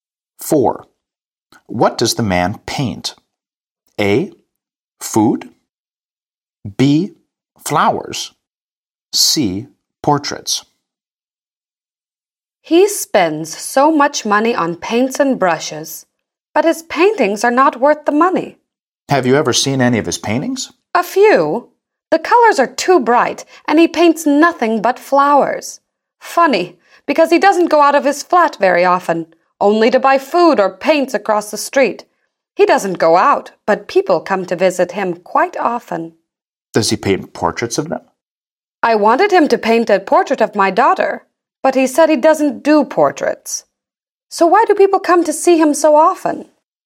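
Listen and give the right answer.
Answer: B: Flowers.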